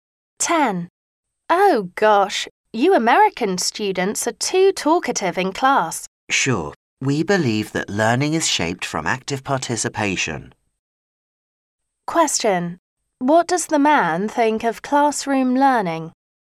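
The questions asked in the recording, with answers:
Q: Question.What does the man think of classroom learning?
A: Active participation in class is important for learning.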